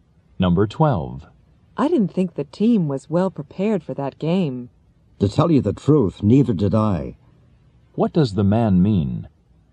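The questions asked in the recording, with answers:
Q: What does the man mean?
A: He also thought the team was not well prepared.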